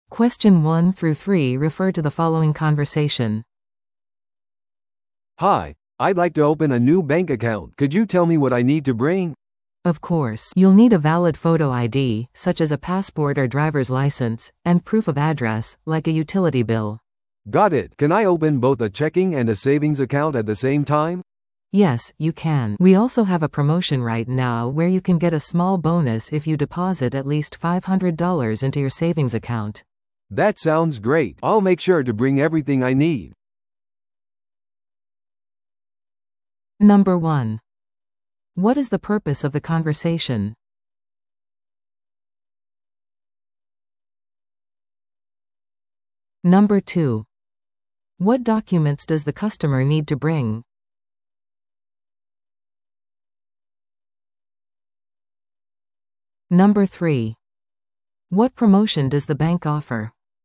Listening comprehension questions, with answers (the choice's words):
Listen to the audio below and answer the questions.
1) What is the purpose of the conversation?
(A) ローンのオプションについて尋ねる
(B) 銀行口座を開設する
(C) 紛失したカードを報告する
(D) 引き出しを行う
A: 銀行口座を開設する

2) What documents does the customer need to bring?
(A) 出生証明書と税務書類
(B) 学生証とメールの確認書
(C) 写真付きIDと住所の証明書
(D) 銀行の取引履歴と紹介状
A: 写真付きIDと住所の証明書

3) What promotion does the bank offer?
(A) 無料のクレジットカード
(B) $500の預金でボーナス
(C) 低金利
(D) 海外取引手数料無料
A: $500の預金でボーナス

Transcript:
A: "Hi, I'd like to open a new bank account. Could you tell me what I need to bring?"
B: "Of course. You'll need a valid photo ID, such as a passport or driver's license, and proof of address, like a utility bill."
A: "Got it. Can I open both a checking and a savings account at the same time?"
B: "Yes, you can. We also have a promotion right now where you can get a small bonus if you deposit at least $500 into your savings account."
A: "That sounds great! I'll make sure to bring everything I need."